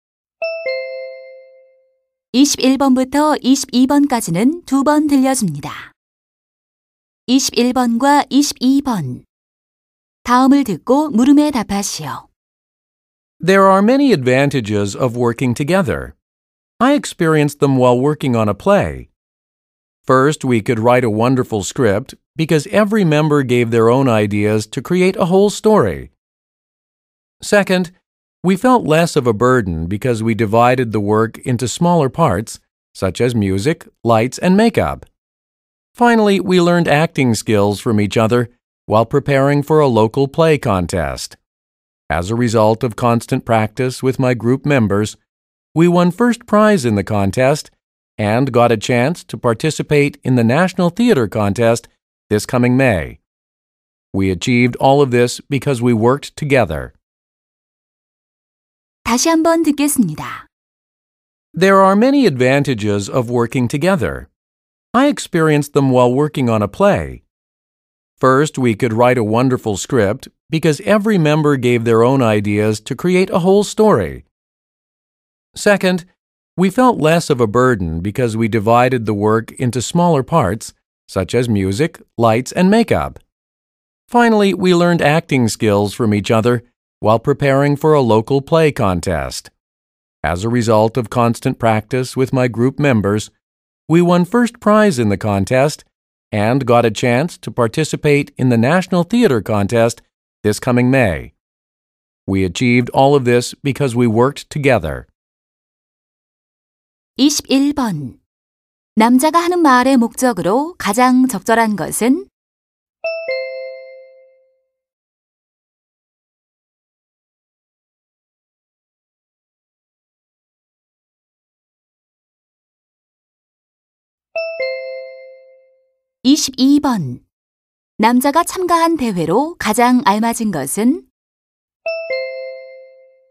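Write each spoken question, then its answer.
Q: 남자가 하는 말의 목적으로 가장 적절한 것은?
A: 협동 작업의 장점을 알리려고

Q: 남자가 참가한 대회로 가장 알맞은 것은?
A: 지역 연극 대회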